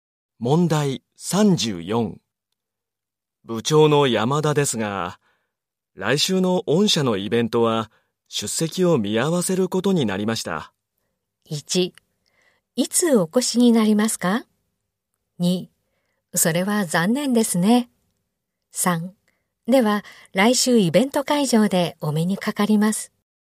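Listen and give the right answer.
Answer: 2: それは残念ですね。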